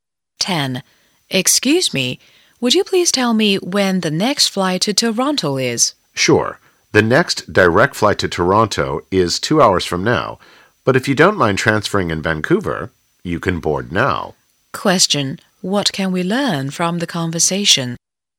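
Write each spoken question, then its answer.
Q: What can we learn from the conversation?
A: A flight to Toronto with a transfer in Vancouver is boarding now; the next direct flight is in 2 hours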